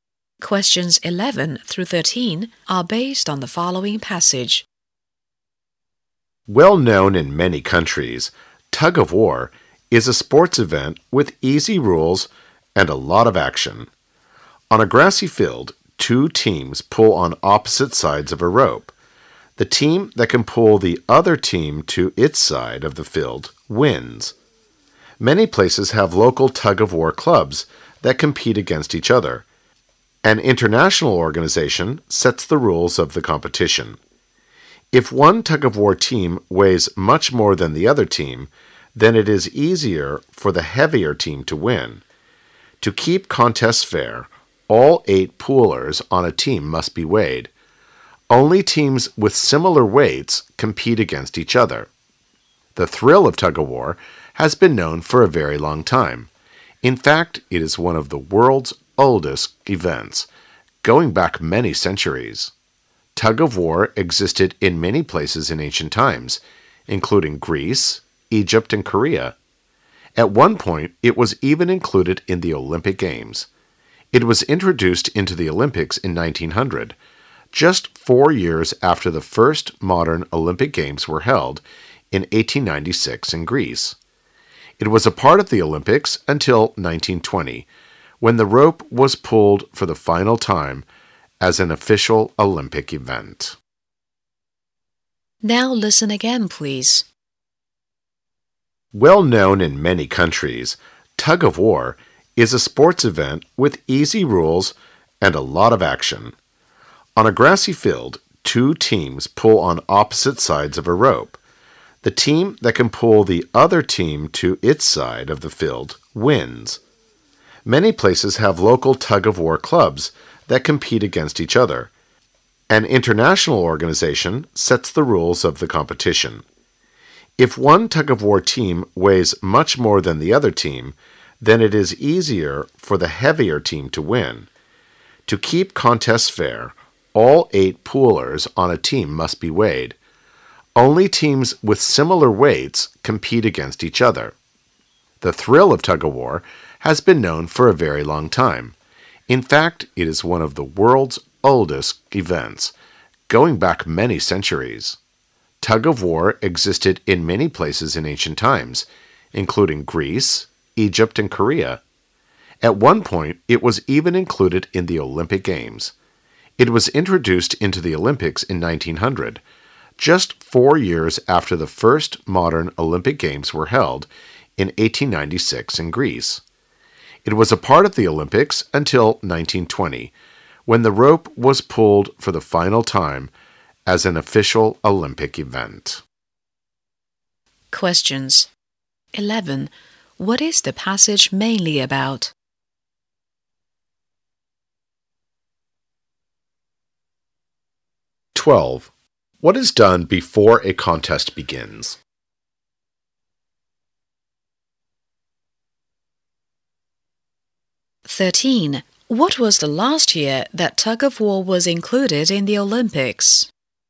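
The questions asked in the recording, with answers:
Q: What is the passage mainly about?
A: Tug-of-war, its rules and history

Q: What is done before a contest begins?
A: All team members are weighed

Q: What was the last year that tug-of-war was included in the Olympics?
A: 1920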